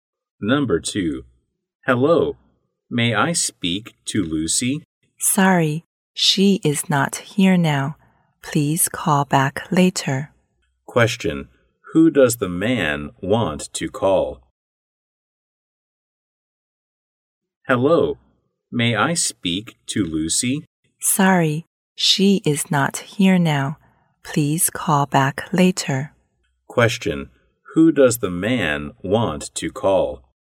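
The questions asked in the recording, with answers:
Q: who does the man want to call?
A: Lucy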